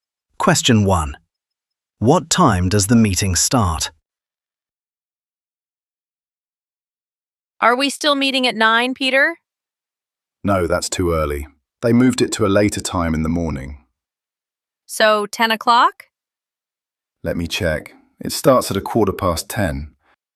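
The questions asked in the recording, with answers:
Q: What time does the meeting start?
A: 10:15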